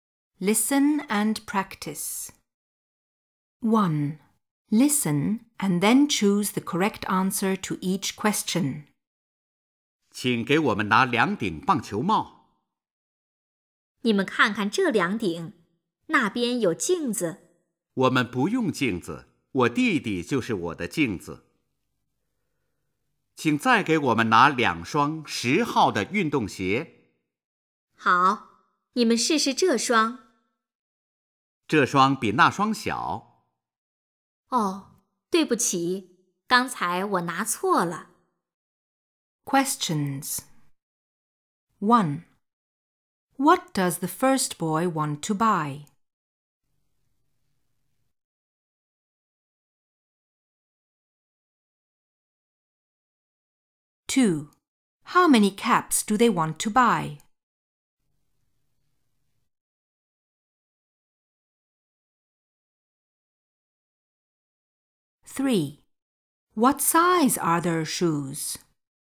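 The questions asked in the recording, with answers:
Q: What does the first boy want to buy?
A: Two baseball caps

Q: How many caps do they want to buy?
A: Two

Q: What size are their shoes?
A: Size ten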